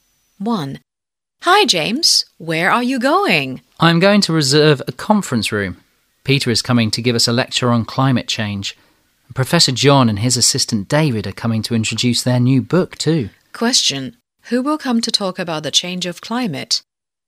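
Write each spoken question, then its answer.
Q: Who will come to talk about the change of climate?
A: Peter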